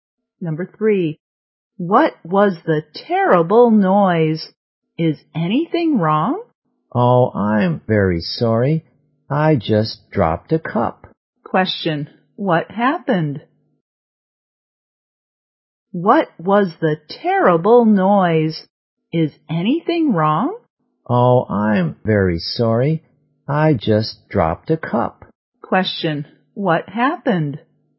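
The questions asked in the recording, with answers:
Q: what happened?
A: The woman dropped a cup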